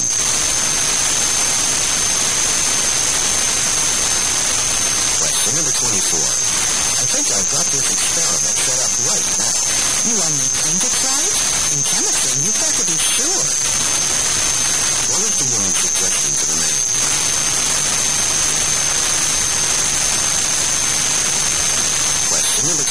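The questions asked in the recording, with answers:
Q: What is the woman's suggestion to the man?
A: Make sure the experiment is set up correctly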